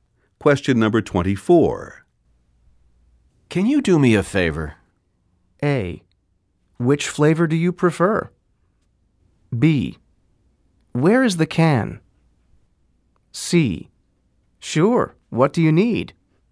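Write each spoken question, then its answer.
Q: Can you do me a favor?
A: C: Sure, what do you need?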